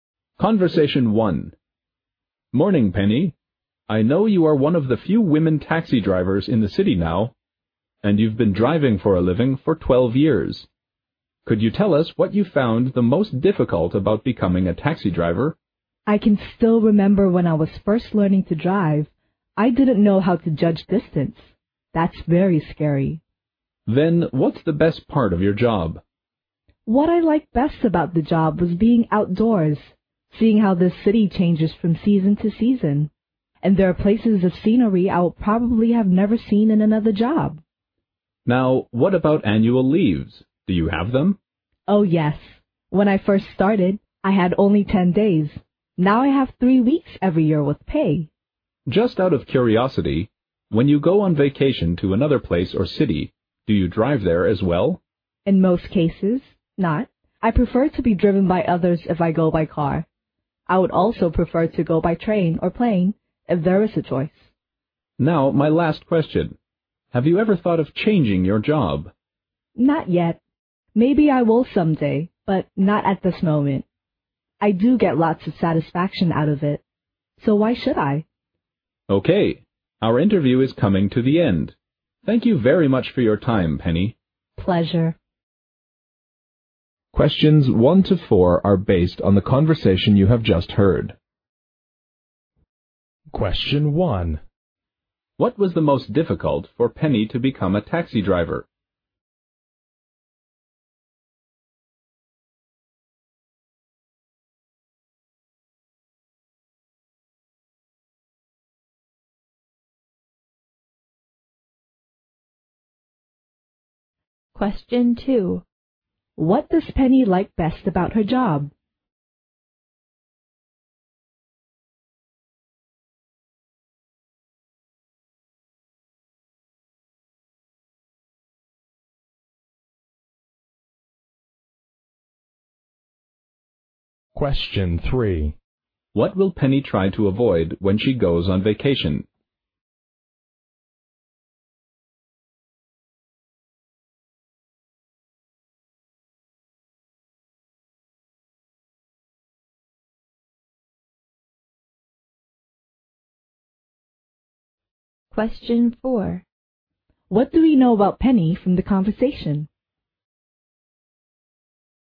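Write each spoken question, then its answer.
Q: What was the most difficult for Penny to become a taxi driver?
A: Judging distance.

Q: What does Penny like best about her job?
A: Being outdoors and seeing how the city changes from season to season.

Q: What will Penny try to avoid when she goes on vacation?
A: Driving there herself.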